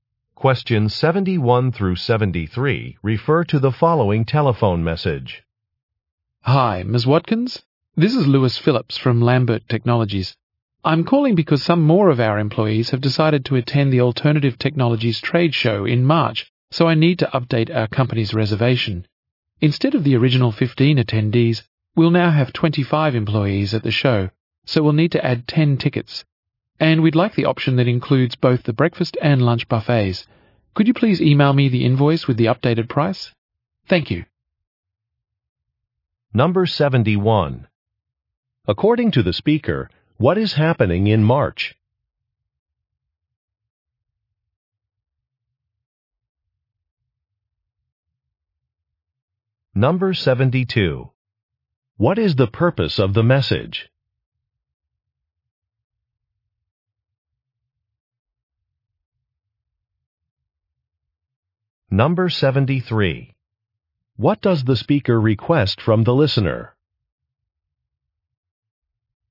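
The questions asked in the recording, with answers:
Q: According to the speaker, what is happening in March?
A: A trade show (Alternative Technologies Trade Show)

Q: What is the purpose of the message?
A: To update a reservation by adding tickets

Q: What does the speaker request from the listener?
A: To email an invoice with the updated price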